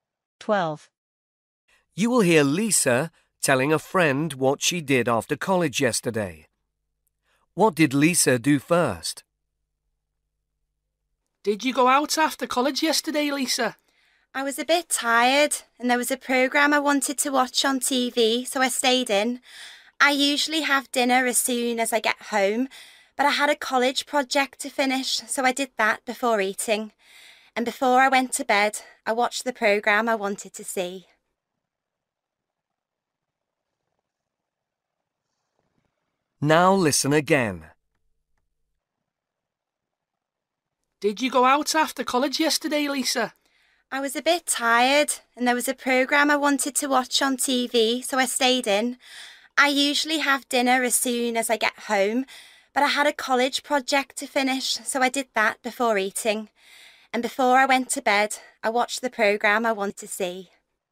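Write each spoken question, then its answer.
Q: What did Lisa do first?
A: finished her college project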